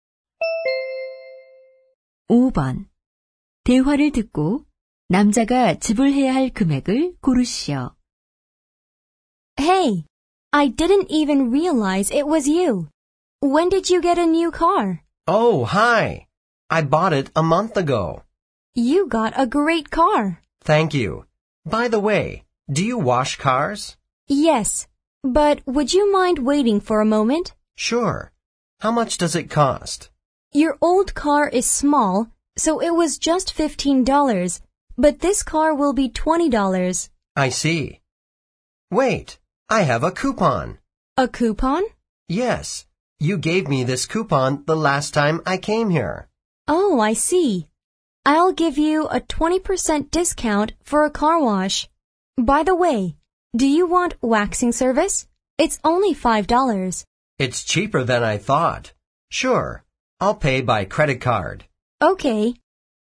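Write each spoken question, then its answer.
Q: 대화를 듣고 남자가 지불해야 할 금액을 고르시오.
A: $21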